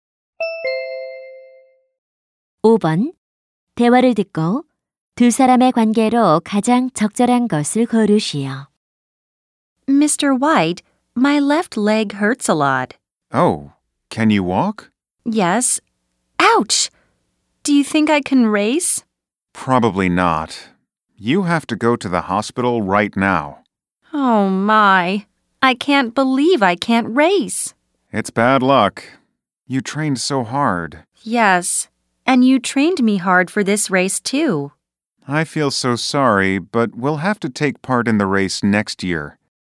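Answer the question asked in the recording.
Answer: 코치와 선수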